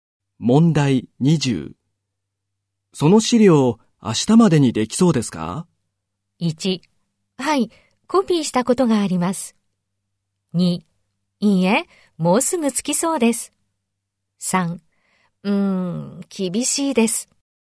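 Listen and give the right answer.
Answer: 3: 厳しいです。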